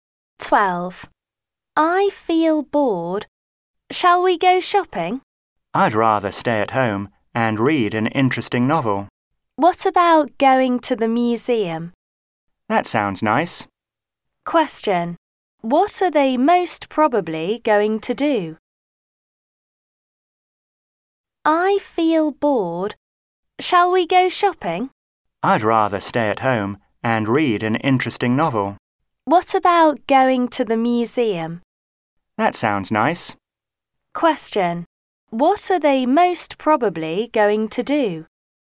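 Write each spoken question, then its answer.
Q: What are they most probably going to do?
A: Go to the museum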